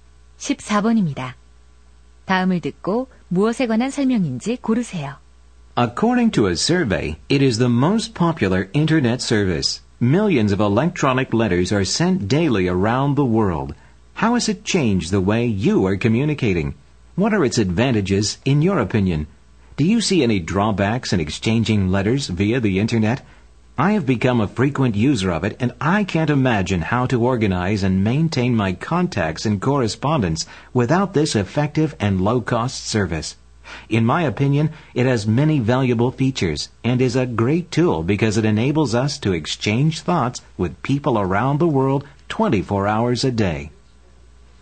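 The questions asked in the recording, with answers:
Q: 다음을 듣고 무엇에 관한 설명인지 고르세요.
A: 이메일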